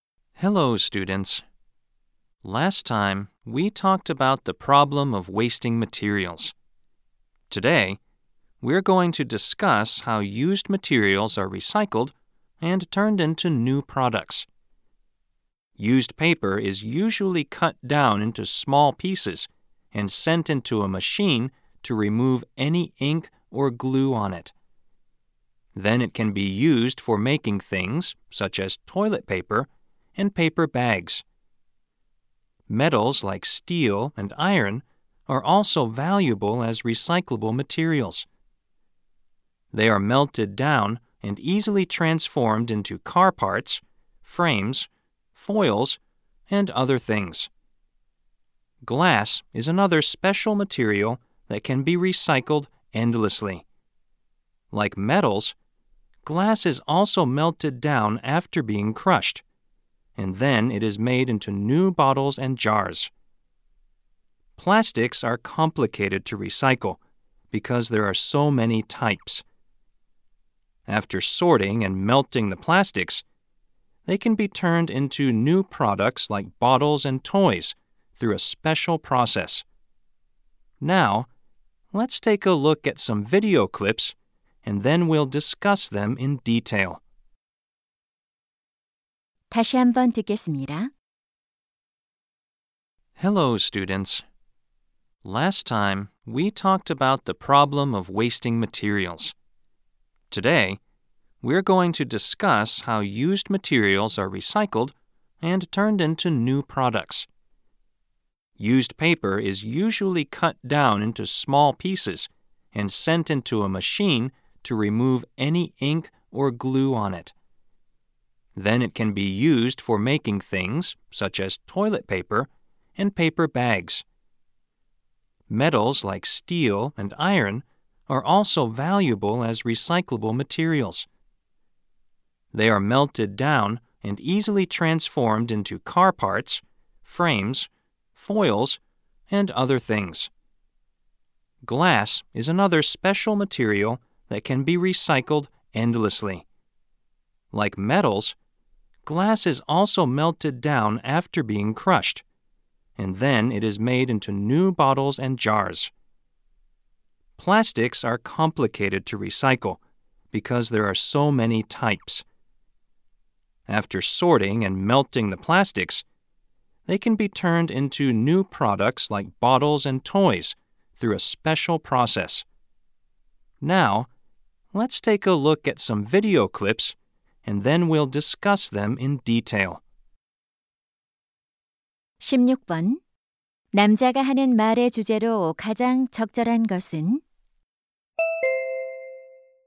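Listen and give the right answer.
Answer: 사용된 재료가 재활용되어 새 제품으로 바뀌는 방법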